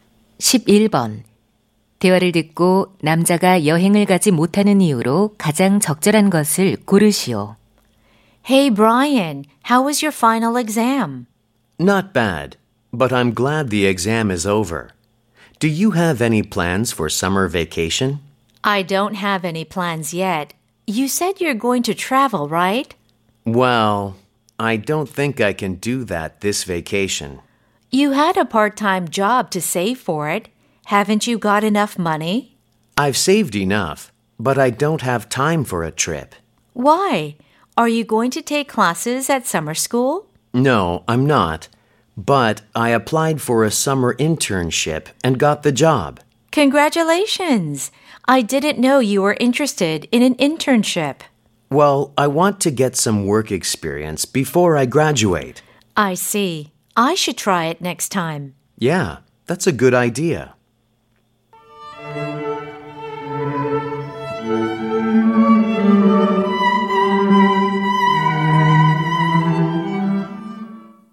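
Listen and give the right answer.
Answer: 여름 인턴십을 하게 되어서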